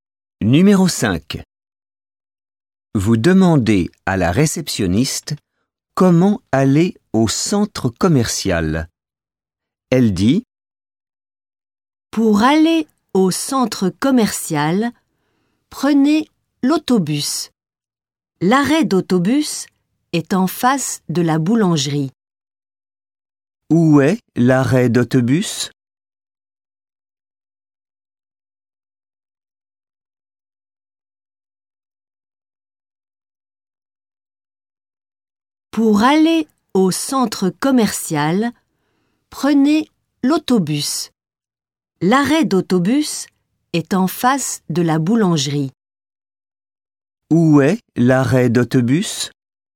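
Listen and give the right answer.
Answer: En face de la boulangerie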